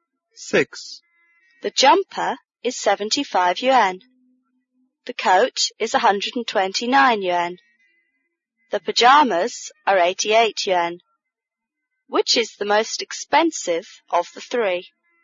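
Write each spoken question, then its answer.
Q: Which is the most expensive of the three?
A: The coat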